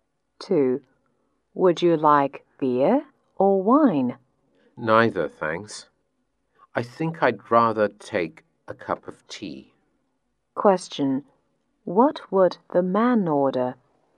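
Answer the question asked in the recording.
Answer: A cup of tea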